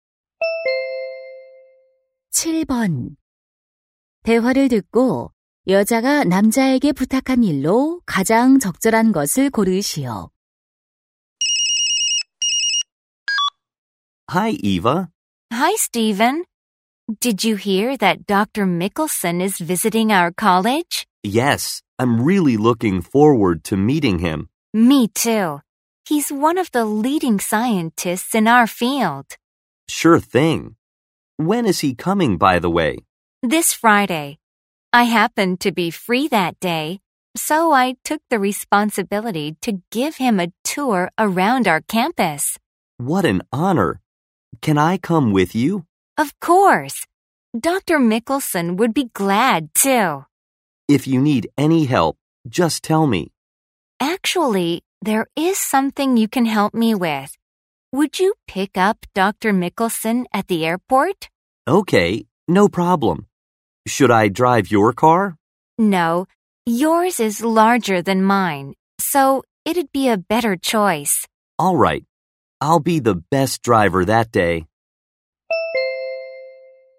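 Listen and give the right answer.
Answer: 공항에 Mickelson 박사 마중 나가기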